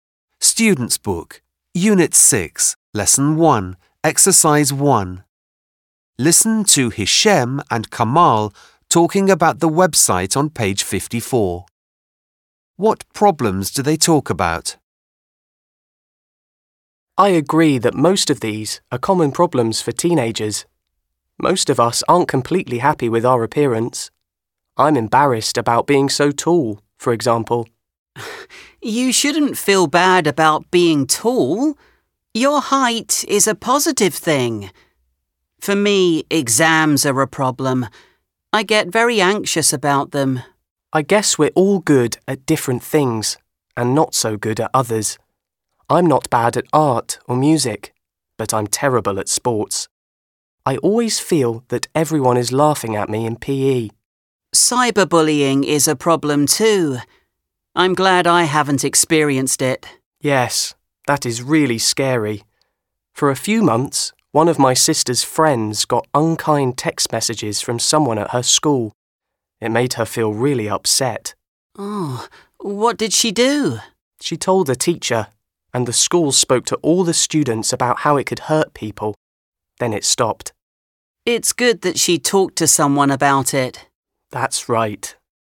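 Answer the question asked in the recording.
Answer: Appearance (being tall), exams, being bad at sports, and cyberbullying.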